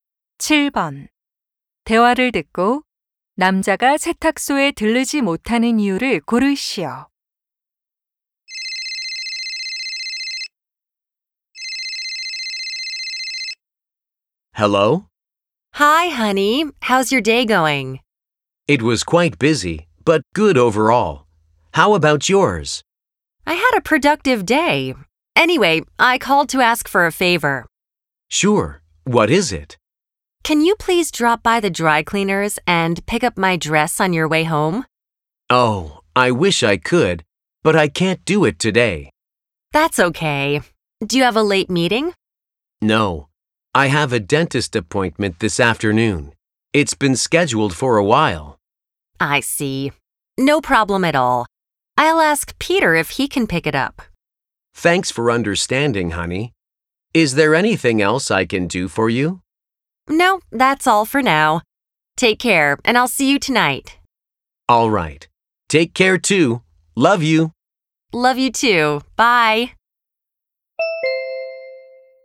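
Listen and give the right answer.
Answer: 치과 예약이 있어서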